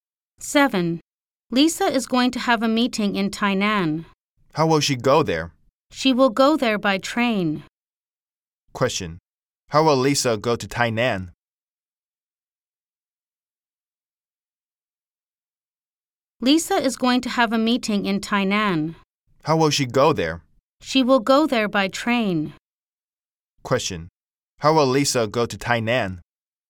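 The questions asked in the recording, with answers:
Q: Question. How will Lisa go to Tainan?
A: By train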